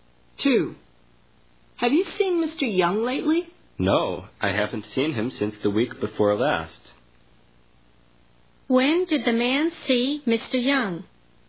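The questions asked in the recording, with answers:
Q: When did the man see Mr. Young?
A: The week before last.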